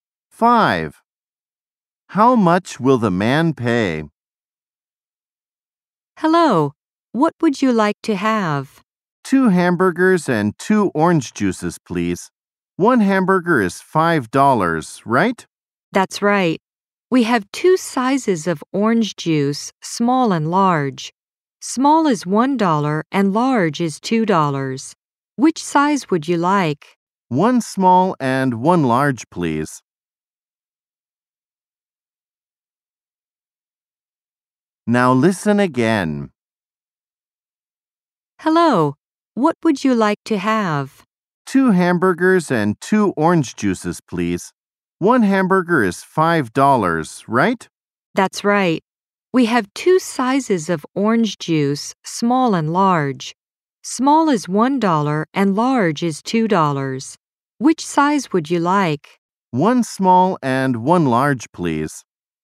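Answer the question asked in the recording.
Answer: $13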